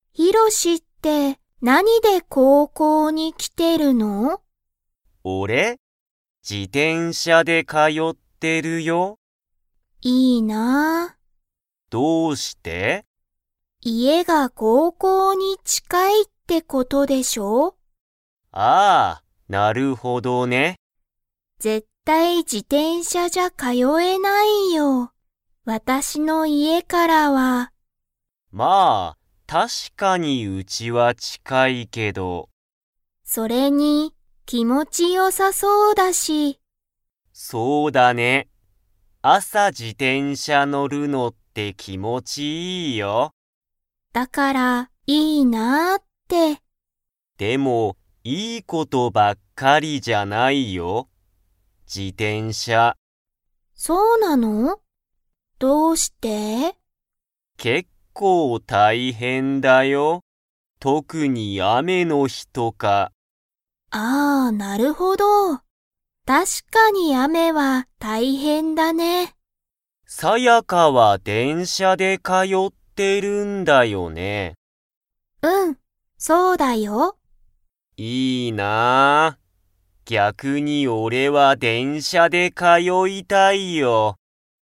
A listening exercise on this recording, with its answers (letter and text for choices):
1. ヒロシは、なにで高校こうこうに通かよってますか?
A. 自動車じどうしゃ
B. 自転車じてんしゃ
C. バス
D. 電車でんしゃ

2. ヒロシは、電車でんしゃで高校こうこうに 。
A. 通かよいたい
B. 通かよいたくない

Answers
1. B. 自転車じてんしゃ
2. A. 通かよいたい

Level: Level 3